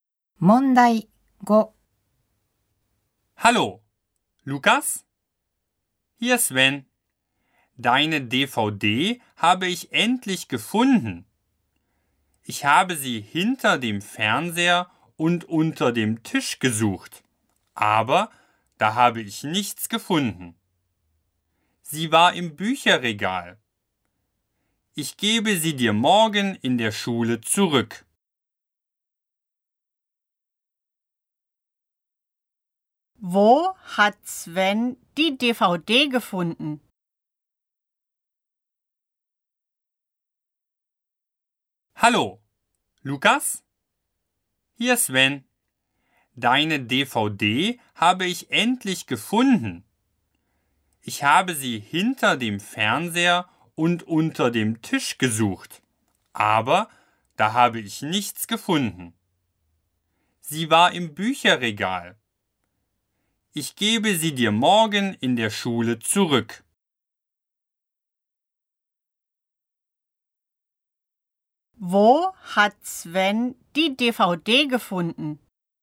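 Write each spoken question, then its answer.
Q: Wo hat Sven die DVD gefunden?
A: Im Bücherregal.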